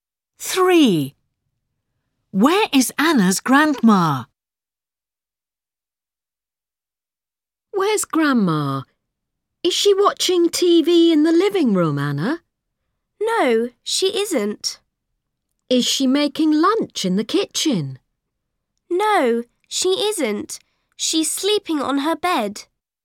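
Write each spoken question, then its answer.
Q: Where is Anna's grandma?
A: on her bed (sleeping)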